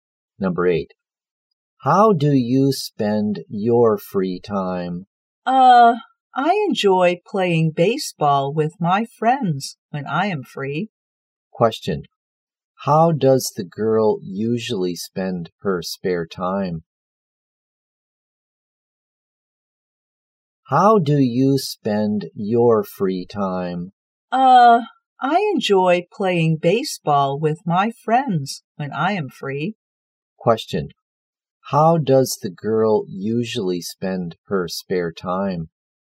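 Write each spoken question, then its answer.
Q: How does the girl usually spend her spare time?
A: Playing baseball with friends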